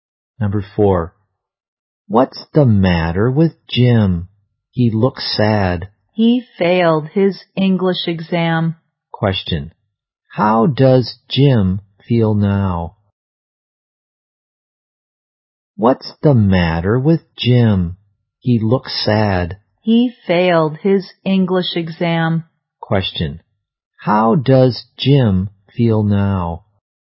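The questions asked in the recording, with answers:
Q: Question. How does Jim feel now?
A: Sad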